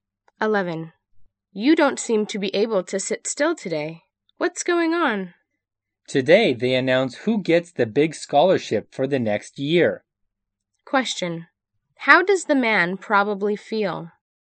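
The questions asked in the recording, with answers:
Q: How does the man probably feel?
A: Anxious about whether he gets the scholarship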